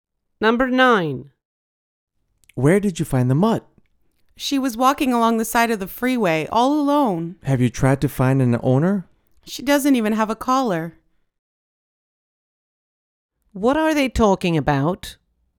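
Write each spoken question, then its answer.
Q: What are they talking about?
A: A stray dog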